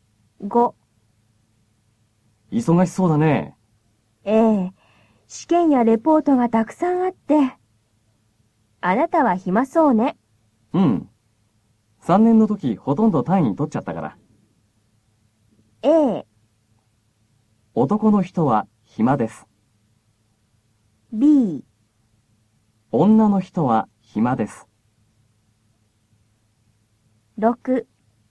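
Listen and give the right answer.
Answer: A: 男の人は暇です。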